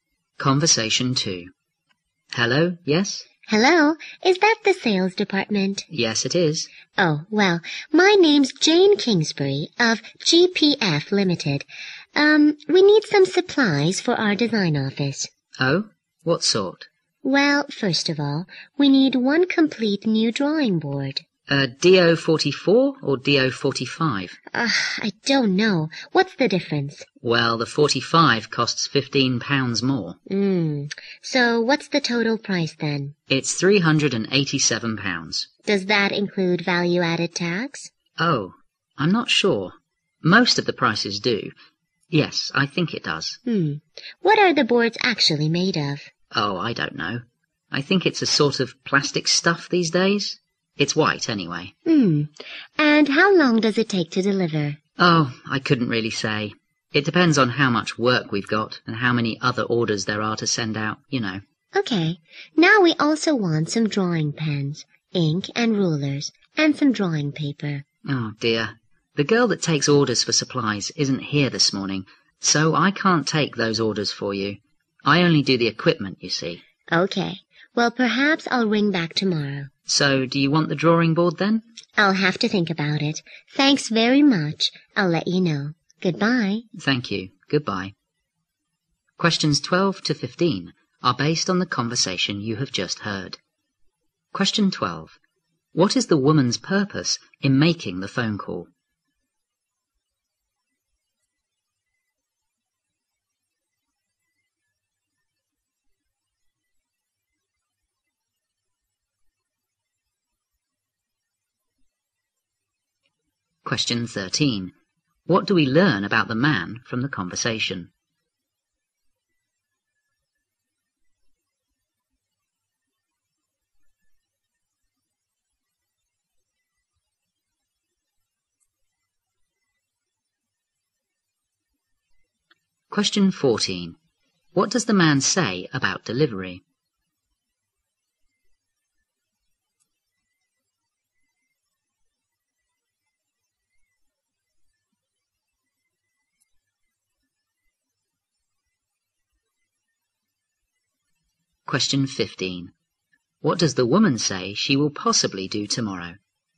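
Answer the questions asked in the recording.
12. To order supplies for her design office.
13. He doesn't know much about the products; he only handles equipment.
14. He can't say how long it takes; it depends on workload and orders.
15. Ring back.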